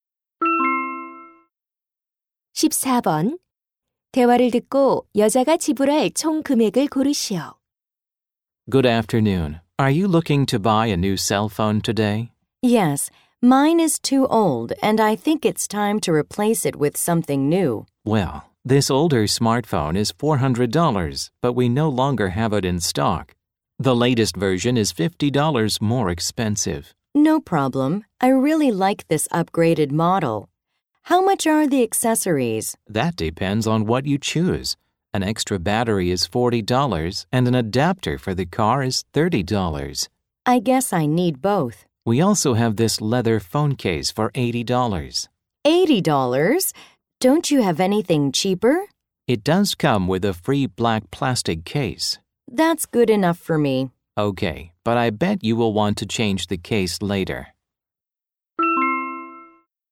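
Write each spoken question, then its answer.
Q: 대화를 듣고 여자가 지불할 총 금액을 고르시오.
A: $520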